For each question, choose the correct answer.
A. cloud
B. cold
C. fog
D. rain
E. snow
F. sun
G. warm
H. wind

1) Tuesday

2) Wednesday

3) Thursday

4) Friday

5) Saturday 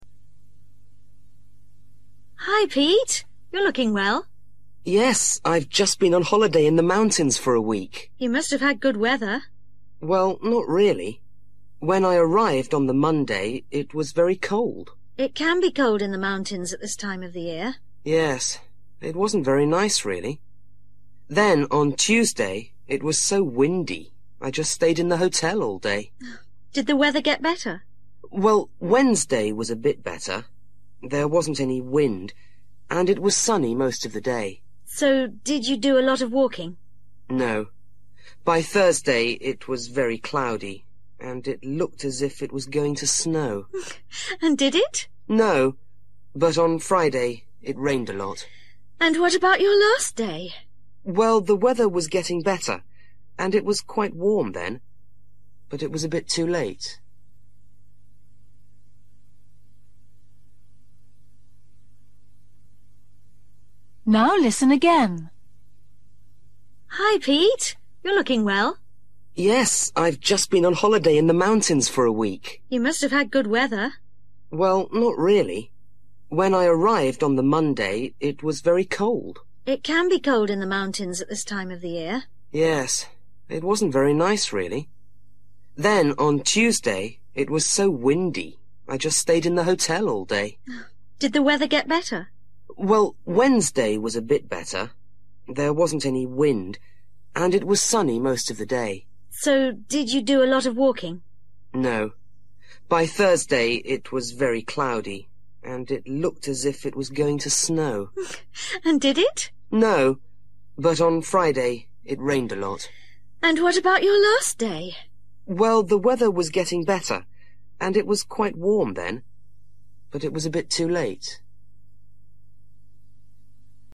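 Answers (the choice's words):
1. wind
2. sun
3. cloud
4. rain
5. warm

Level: Luyện nghe trình độ A2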